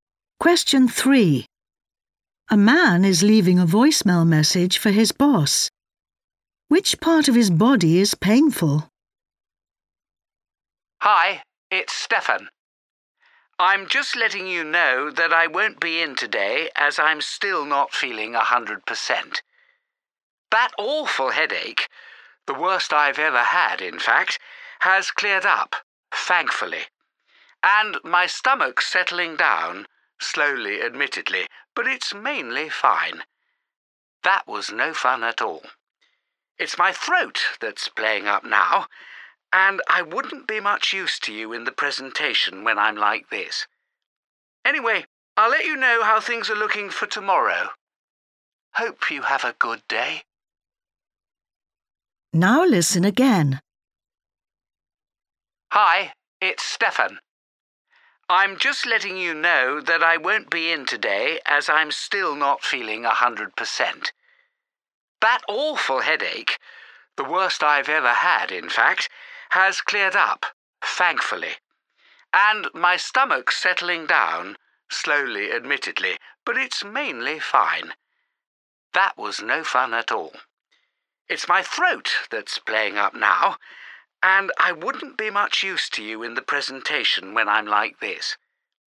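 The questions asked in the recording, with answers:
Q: Which part of his body is painful?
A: his throat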